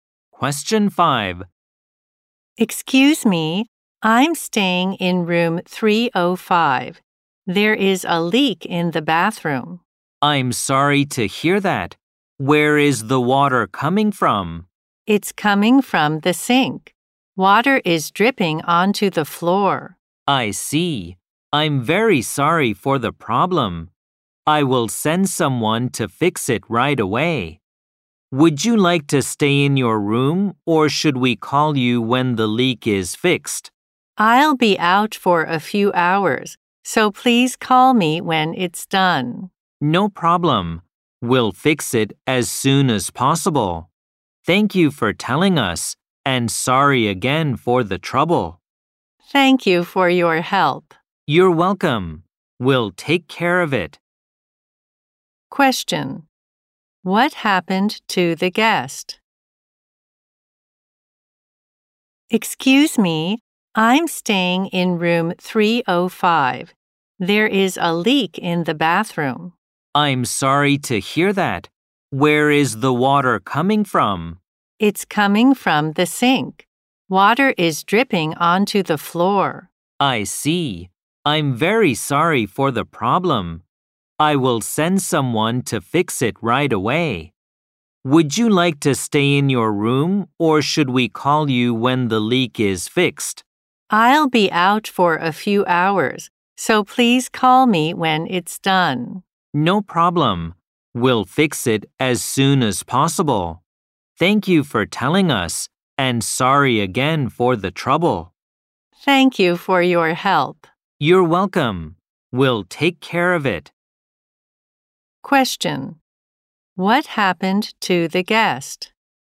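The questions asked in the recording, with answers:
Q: What happened to the guest?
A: Water was leaking from the sink in the guest's bathroom.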